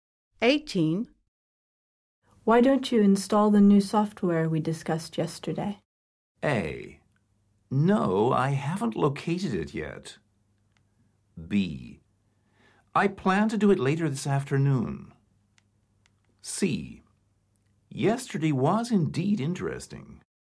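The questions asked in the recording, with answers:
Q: Why don't you install the new software we discussed yesterday?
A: B: I plan to do it later this afternoon.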